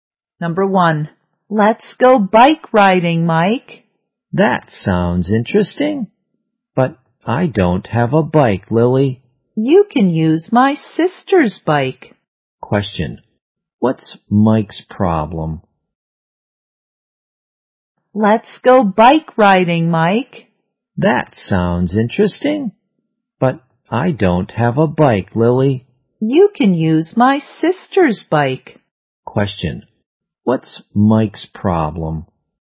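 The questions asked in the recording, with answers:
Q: what's Mike's problem?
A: He doesn't have a bike.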